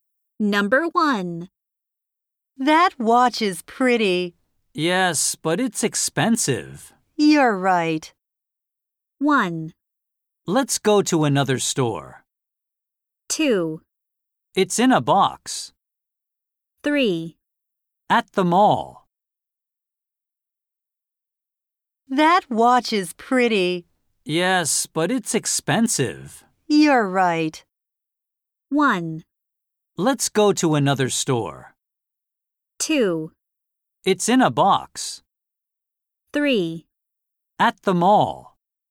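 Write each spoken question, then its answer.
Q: You're right.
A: 1: Let's go to another store.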